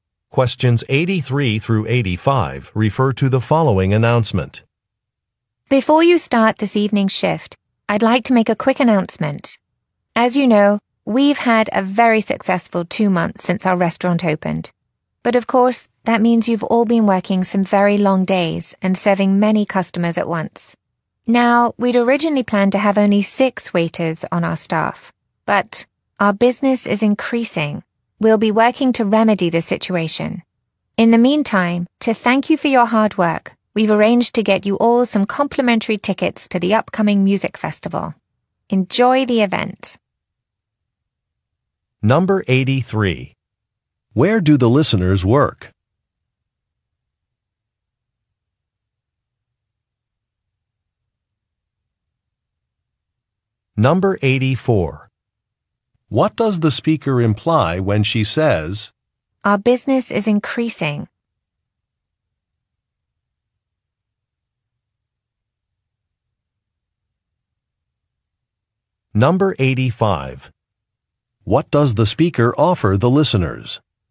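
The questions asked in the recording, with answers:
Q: Where do the listeners work?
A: At a restaurant

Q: What does the speaker offer the listeners?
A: Free tickets to a music festival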